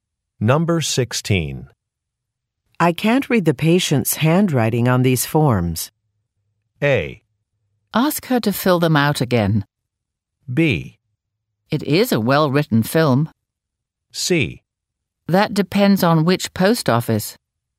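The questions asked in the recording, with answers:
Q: I can't read the patient's handwriting on these forms.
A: A: Ask her to fill them out again.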